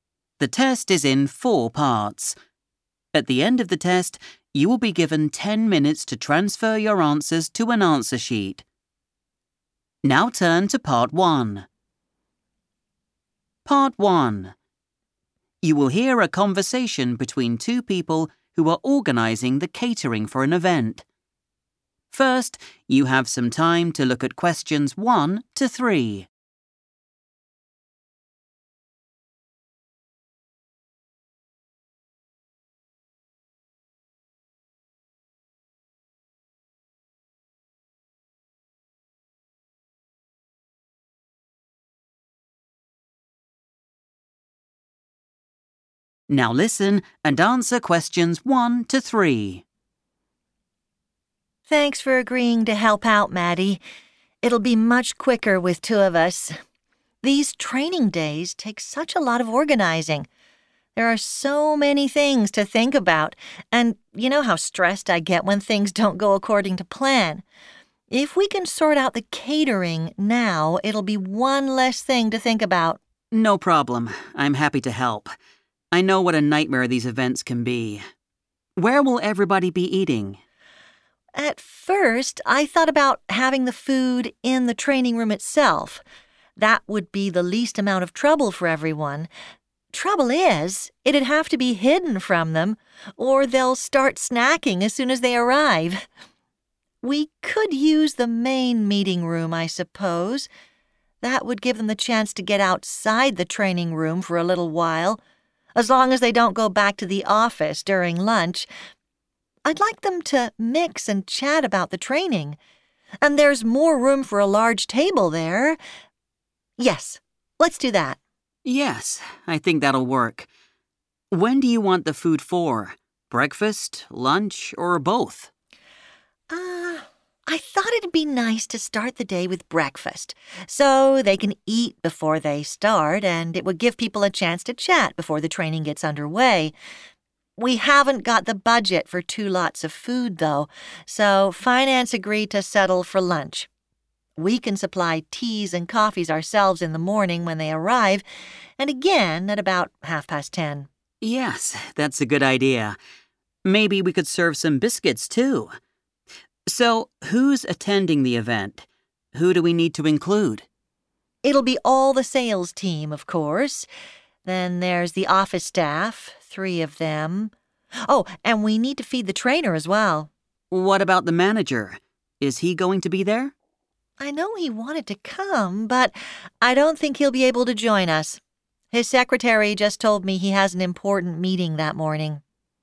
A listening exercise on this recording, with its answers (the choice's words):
Choose the correct letter, A, B or C.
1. The food will be placed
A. in the office.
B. in the training room.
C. outside the training room.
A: outside the training room.

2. The company is only providing food at lunchtime because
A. attendees will already have had breakfast.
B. breakfast is more expensive than lunch.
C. there is only enough money to provide lunch.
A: there is only enough money to provide lunch.

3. Which of the following people will be at the lunch?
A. the manager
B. the secretary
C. the trainer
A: the trainer

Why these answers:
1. The correct answer is C because Natalie chooses to have the food in the 'main meeting room' instead of the 'training room.' She explains that this decision allows the staff to 'get outside the training room' for a short time. While she initially thought about keeping the food in the training room for convenience, she decided against it to prevent people from snacking too early and to encourage them to talk to each other in a different space.
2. The correct answer is C because Natalie mentions that they do not have the 'budget' for more than one meal. In business, a 'budget' is the specific amount of money a group is allowed to spend. Since the money was limited, the Finance department decided to pay for lunch only instead of buying both breakfast and lunch.
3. The correct answer is the trainer because Natalie specifically includes this person in the list of people who need food. While the manager wanted to attend, Natalie explains that he cannot join because of a meeting scheduled at the same time. The secretary is mentioned only as the source of information about the manager's schedule, not as an attendee. Key phrases to watch for include 'feed' (which refers to giving food) and 'not be able to join' (meaning not attending).

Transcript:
Natalie: Thanks for agreeing to help out, Matti. It'll be much quicker with two of us. These training days take such a lot of organising. There are so many things to think about and you know how stressed I get when things don't go according to plan. If we can sort out the catering now, it'll be one less thing to think about.
Matti: No problem. I'm happy to help. I know what a nightmare these events can be. Where will everybody be eating?
Natalie: At first, I thought about having the food in the training room itself. That would be the least amount of trouble for everyone. Trouble is, it'd have to be hidden from them or they'll start snacking as soon as they arrive. We could use the main meeting room, I suppose. That would give them the chance to get outside the training room for a little while. As long as they don't go back to the office during lunch. I'd like them to mix and chat about the training. And there's more room for a large table there. Yes, let's do that.
Matti: Yes, I think that'll work. When do you want the food for: breakfast, lunch or both?
Natalie: I thought if d be nice to start the day with breakfast so they can eat before they start and it would give people a chance to chat before the training gets underway. We haven't got the budget for two lots of food, though, so Finance agreed to settle for lunch. We can supply teas and coffees ourselves in the morning when they arrive and again at about half past ten.
Matti: Yes, that's a good idea. Maybe we could serve some biscuits too. So, who's attending the event? Who do we need to include?
Natalie: It'll be all the sales team, of course. Then there's the office staff, three of them. Oh, and we need to feed the trainer as well.
Matti: What about the manager? Is he going to be there?
Natalie: I know he wanted to come but I don't think he'll be able to join us. His secretary just told me he has an important meeting that morning.